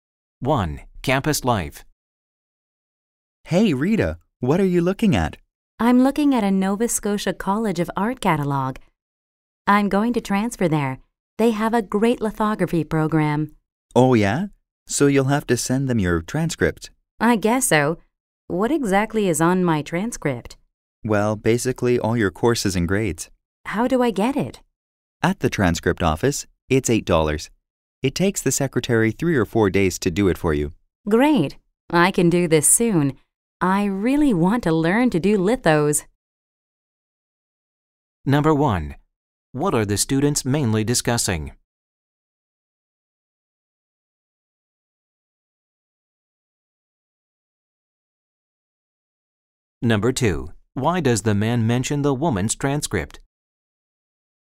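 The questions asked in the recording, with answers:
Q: What are the students mainly discussing?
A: The woman's plan to transfer to another art college and getting her transcript

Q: Why does the man mention the woman's transcript?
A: She has to send it to the college she is transferring to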